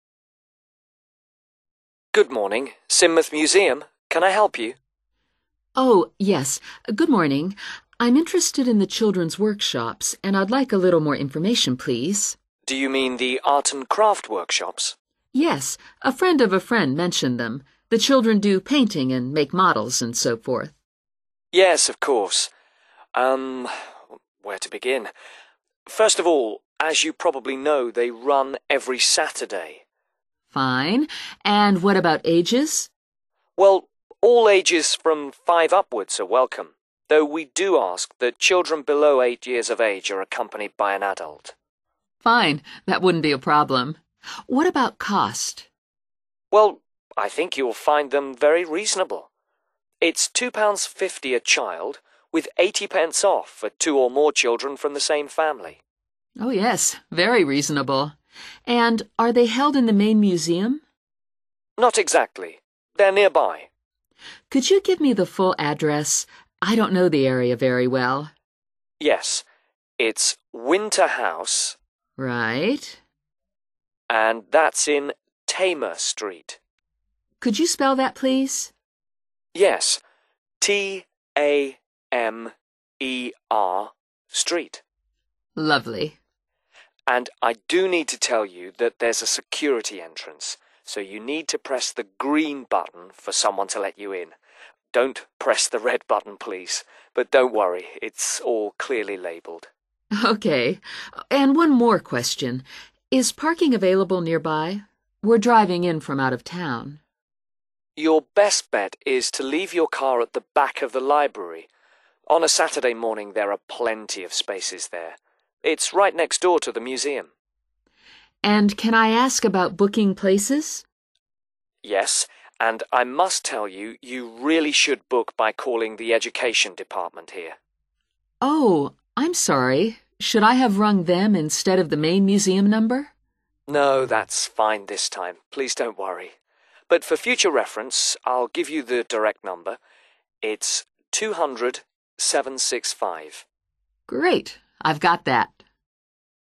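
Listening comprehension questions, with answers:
Complete the sentences below, using NO MORE THAN TWO WORDS AND/OR A NUMBER for each answer.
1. Adults must accompany children under 1 ......................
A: 8

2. Workshops held in: Winter House, 2................... Street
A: Tamer

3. Security device: must push the 3 .................... to open door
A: green button

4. Should leave car behind the 4 ........................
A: library

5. Book workshops by phoning the 5 .................... (on 200765)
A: education department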